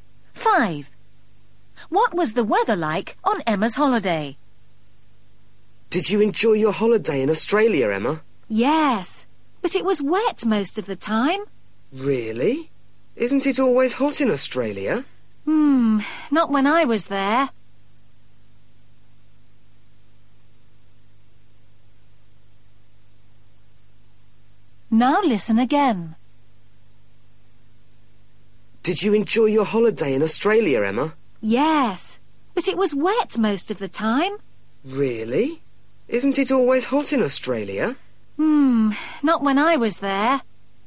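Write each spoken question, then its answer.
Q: What was the weather like on Emma's holiday?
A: Wet (rainy)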